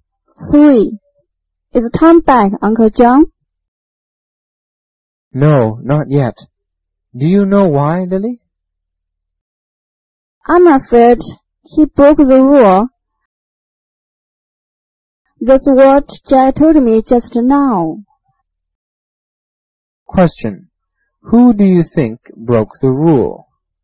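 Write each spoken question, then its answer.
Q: Who do you think broke the rule?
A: Tom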